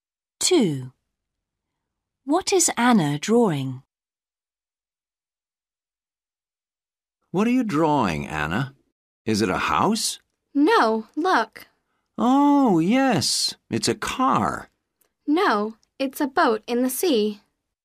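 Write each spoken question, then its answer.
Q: What is Anna drawing?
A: a boat in the sea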